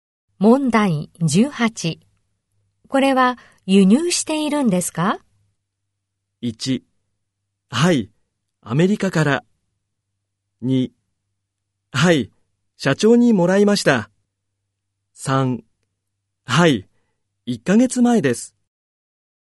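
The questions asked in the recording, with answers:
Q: これは輸入しているんですか?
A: 1: はい、アメリカから。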